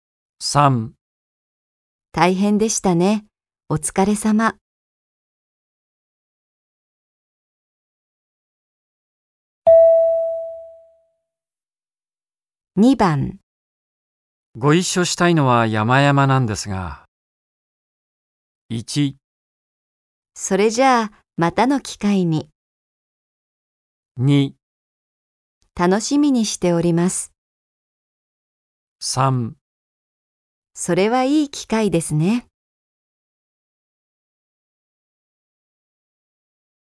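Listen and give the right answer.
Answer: 1: それじゃあ、またの機会に。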